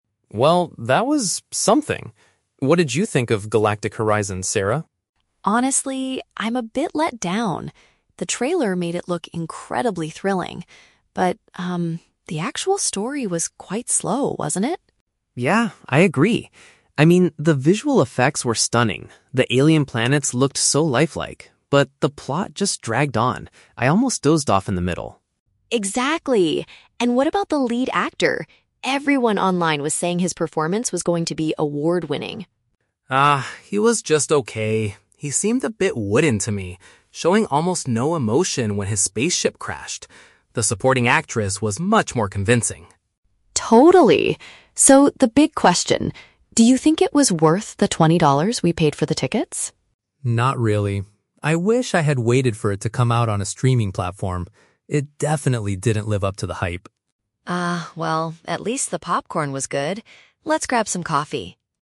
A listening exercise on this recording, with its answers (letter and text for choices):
Listen to two friends discussing a movie they just watched. Choose the correct answer (A, B, or C) for each question.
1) What was the woman's opinion about the movie's storyline?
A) It was very exciting.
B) It lacked pace.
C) It was confusing to follow.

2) How did the man feel about the main actor's performance?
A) He deserved an award.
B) He lacked facial expressions.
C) He was better than the female actors.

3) What do the speakers conclude about the cost of the movie?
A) It was a waste of their money.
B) It was worth the twenty dollars.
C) The streaming platform is too expensive.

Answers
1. B) It lacked pace.
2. B) He lacked facial expressions.
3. A) It was a waste of their money.

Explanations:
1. The woman (Sarah) says the story was "quite slow" and the man agrees that the plot "dragged on". This means it lacked pace (speed). The Trap: Option (A) is a trap. The woman mentions the word "thrilling" (exciting), but she is talking about the trailer, not the actual movie. Option (C) is plausible for a sci-fi movie but was never mentioned.
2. The man (Mark) describes the lead actor as "wooden" and says he showed "almost no emotion". This paraphrases to lacking facial expressions. The Trap: Option (A) is a trap. The woman mentions "award-winning", but that was what "everyone online was saying", not the man's actual opinion. Option (C) is incorrect because Mark states the supporting actress was actually more convincing.
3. When asked if the movie was worth the twenty dollars, the man says "Not really" and wishes he had waited to watch it at home. This implies spending the money at the cinema was a waste. The Trap: Option (B) contains the exact words from the audio ("worth the twenty dollars"), but the man rejects this idea. Option (C) mentions the streaming platform, but they don't discuss its price.

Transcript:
Mark: Well, that was... something. What did you think of Galactic Horizons, Sarah?
Sarah: Honestly, I'm a bit let down. The trailer made it look incredibly thrilling. But, um, the actual story was quite slow, wasn't it?
Mark: Yeah, I agree. I mean, the visual effects were stunning. The alien planets looked so lifelike. But the plot just dragged on. I almost dozed off in the middle.
Sarah: Exactly! And what about the lead actor? Everyone online was saying his performance was going to be award-winning.
Mark: Ah, he was just okay. He seemed a bit wooden to me, showing almost no emotion when his spaceship crashed. The supporting actress was much more convincing.
Sarah: Totally. So, the big question: do you think it was worth the twenty dollars we paid for the tickets?
Mark: Not really. I wish I had waited for it to come out on a streaming platform. It definitely didn't live up to the hype.